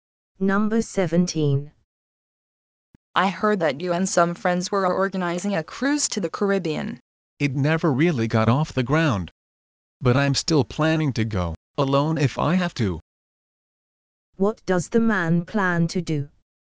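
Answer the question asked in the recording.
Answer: Go on the cruise, alone if necessary.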